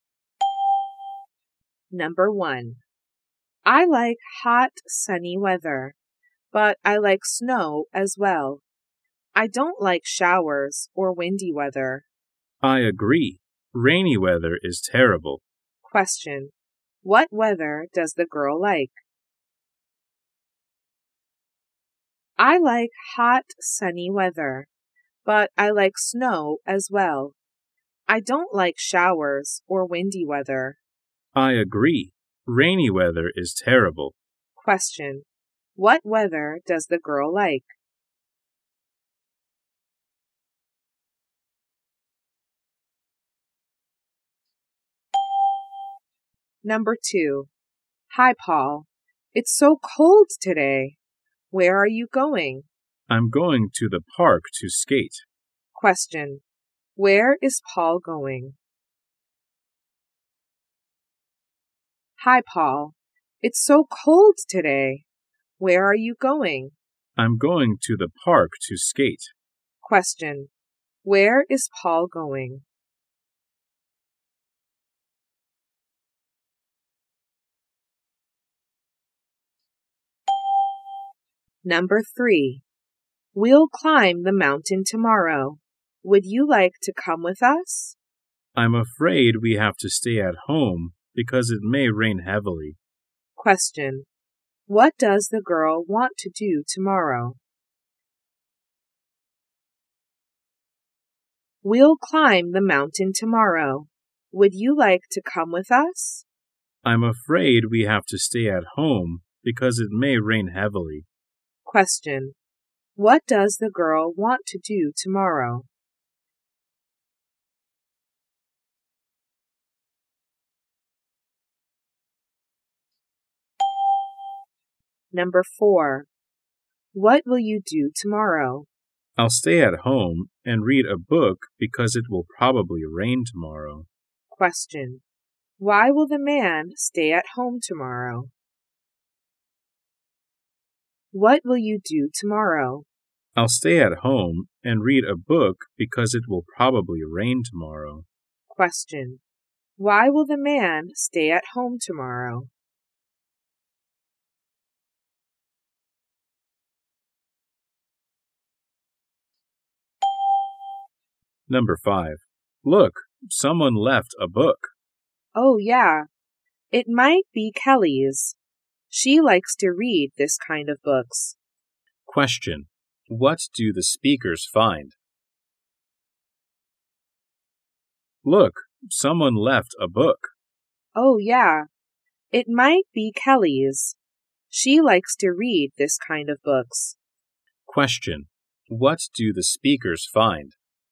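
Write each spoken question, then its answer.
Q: What weather does the girl like?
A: Hot, sunny weather and snow

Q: Where is Paul going?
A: To the park

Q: Why will the man stay at home tomorrow?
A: Because it will probably rain

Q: What do the speakers find?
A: A book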